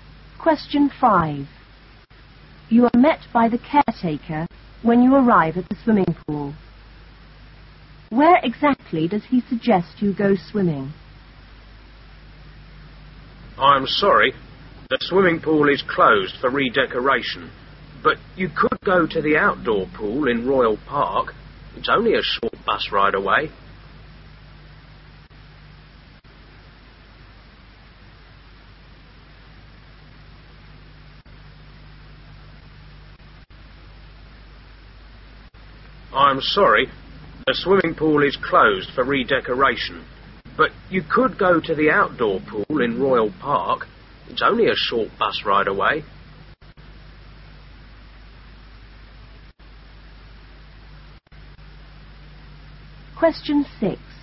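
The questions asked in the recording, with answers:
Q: Where exactly does he suggest you go swimming?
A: The outdoor pool in Royal Park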